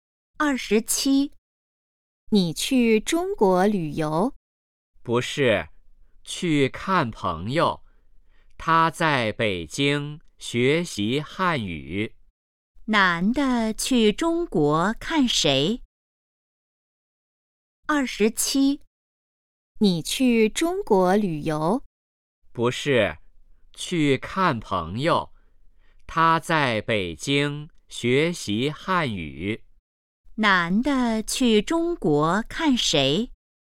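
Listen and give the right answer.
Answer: 朋友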